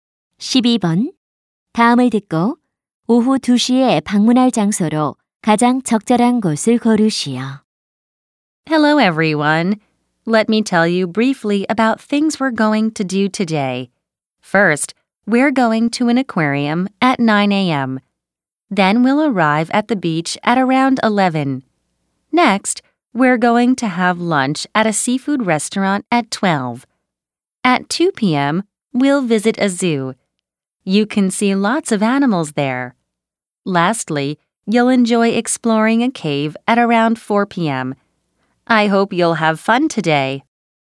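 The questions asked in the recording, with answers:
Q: 다음을 듣고 오후 2시에 방문할 장소로 가장 적절한 곳을 고르시오.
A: 동물원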